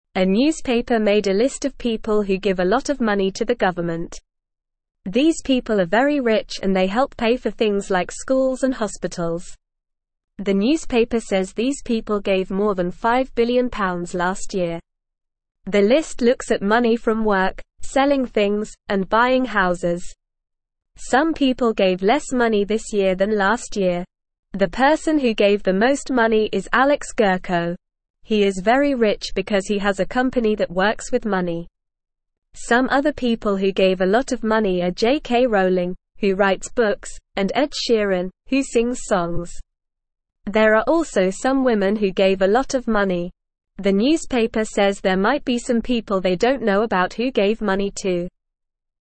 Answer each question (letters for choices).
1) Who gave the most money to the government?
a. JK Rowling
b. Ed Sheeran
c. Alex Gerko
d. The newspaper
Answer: c

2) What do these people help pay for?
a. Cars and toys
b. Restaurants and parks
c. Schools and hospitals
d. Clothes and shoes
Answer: c

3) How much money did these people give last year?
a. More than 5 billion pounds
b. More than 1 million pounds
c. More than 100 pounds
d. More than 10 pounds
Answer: a

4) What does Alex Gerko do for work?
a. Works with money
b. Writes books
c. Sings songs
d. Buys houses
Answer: a

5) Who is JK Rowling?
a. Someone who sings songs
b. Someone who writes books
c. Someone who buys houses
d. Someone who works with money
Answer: b

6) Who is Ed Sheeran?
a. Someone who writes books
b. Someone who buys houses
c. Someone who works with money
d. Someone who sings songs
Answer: d

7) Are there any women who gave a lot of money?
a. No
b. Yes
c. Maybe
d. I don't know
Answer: b

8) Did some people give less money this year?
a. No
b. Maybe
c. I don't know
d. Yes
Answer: d

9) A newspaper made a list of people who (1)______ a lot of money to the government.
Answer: give

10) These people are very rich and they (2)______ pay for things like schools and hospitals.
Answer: help

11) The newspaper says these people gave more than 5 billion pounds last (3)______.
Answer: year

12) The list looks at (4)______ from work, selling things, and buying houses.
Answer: money

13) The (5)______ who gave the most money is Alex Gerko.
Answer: person

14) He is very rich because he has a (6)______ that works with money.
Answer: company

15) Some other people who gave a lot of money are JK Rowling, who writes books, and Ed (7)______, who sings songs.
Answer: Sheeran

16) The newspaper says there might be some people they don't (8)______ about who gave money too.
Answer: know

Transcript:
A newspaper made a list of people who give a lot of money to the government. These people are very rich and they help pay for things like schools and hospitals. The newspaper says these people gave more than 5 billion pounds last year. The list looks at money from work, selling things, and buying houses. Some people gave less money this year than last year.
The person who gave the most money is Alex Gerko. He is very rich because he has a company that works with money. Some other people who gave a lot of money are JK Rowling, who writes books, and Ed Sheeran, who sings songs. There are also some women who gave a lot of money. The newspaper says there might be some people they don't know about who gave money too.

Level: Level 1